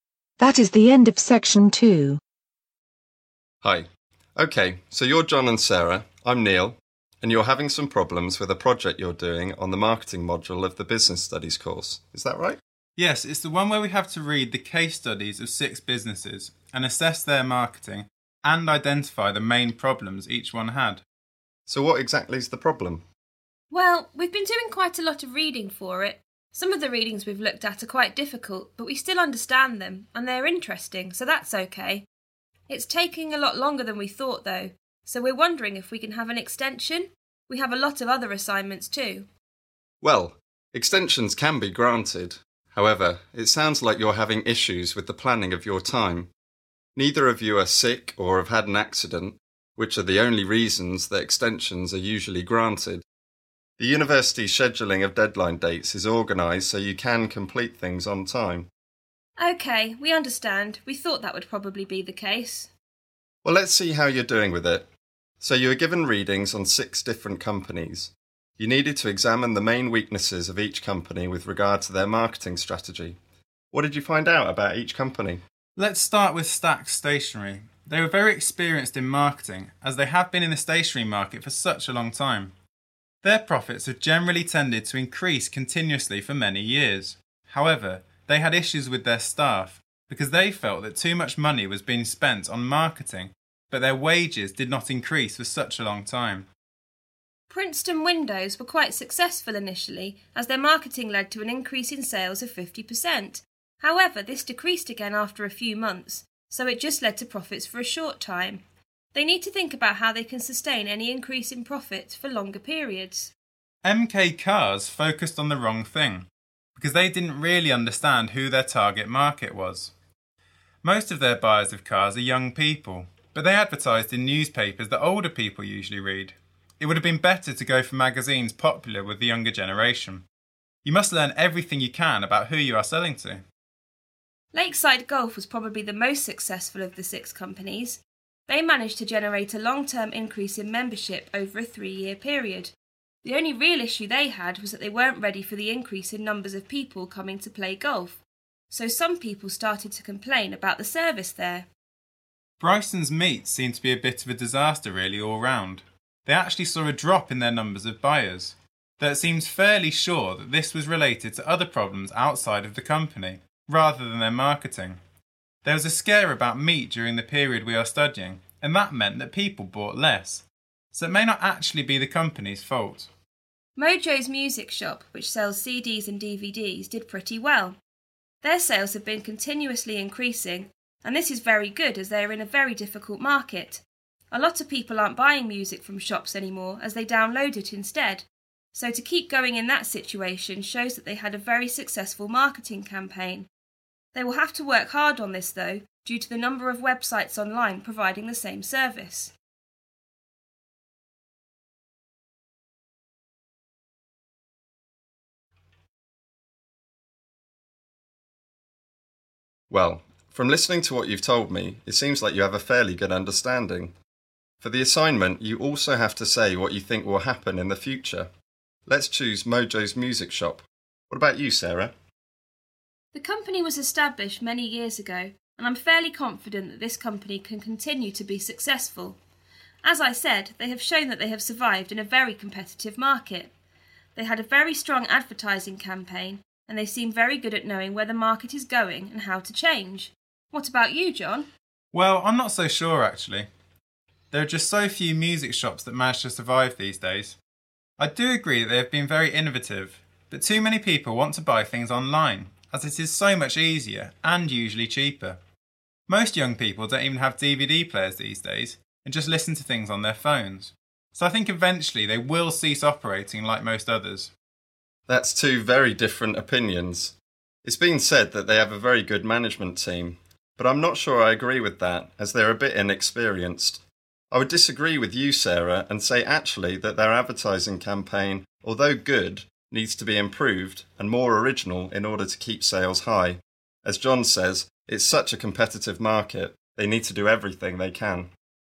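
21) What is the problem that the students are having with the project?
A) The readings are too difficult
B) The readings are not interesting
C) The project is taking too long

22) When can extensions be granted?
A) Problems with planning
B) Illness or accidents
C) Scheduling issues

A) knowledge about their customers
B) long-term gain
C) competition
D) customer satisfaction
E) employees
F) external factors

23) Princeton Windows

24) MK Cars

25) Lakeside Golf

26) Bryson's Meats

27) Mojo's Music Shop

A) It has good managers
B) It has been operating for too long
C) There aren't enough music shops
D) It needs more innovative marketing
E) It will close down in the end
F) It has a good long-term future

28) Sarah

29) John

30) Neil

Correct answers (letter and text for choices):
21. C) The project is taking too long
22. B) Illness or accidents
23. B) long-term gain
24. A) knowledge about their customers
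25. D) customer satisfaction
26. F) external factors
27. C) competition
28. F) It has a good long-term future
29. E) It will close down in the end
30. D) It needs more innovative marketing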